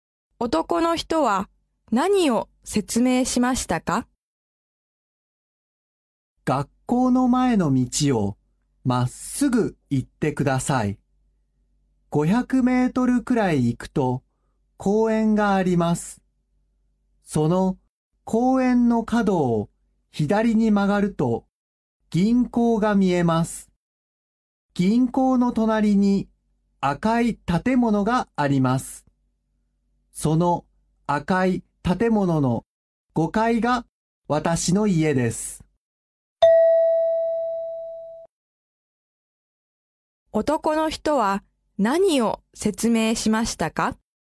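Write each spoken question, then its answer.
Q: 男の人は何を説明しましたか?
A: 自分の家への行き方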